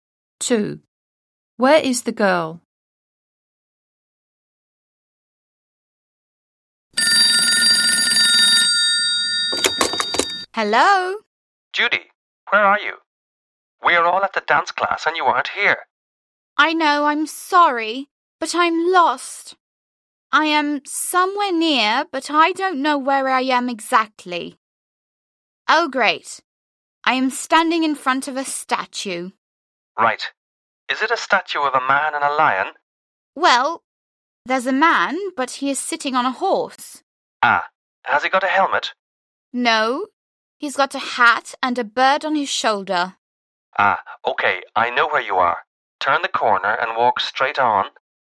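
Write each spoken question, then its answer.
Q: Where is the girl?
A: In front of a statue of a man on a horse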